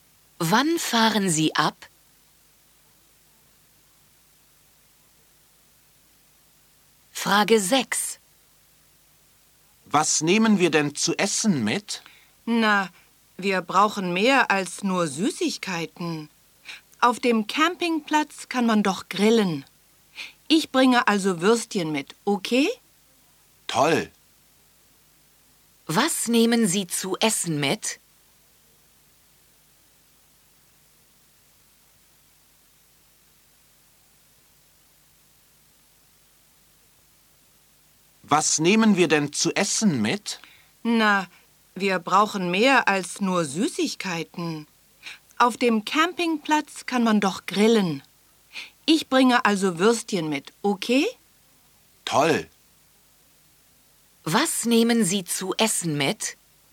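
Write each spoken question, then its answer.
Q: Was nehmen Sie zu essen mit?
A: Würstchen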